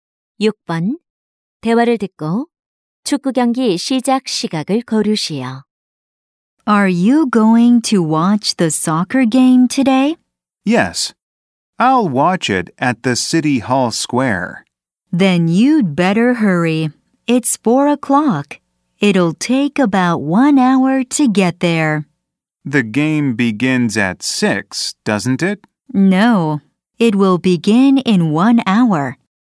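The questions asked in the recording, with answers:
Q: 대화를 듣고 축구 경기 시작 시각을 고르시오.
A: 5시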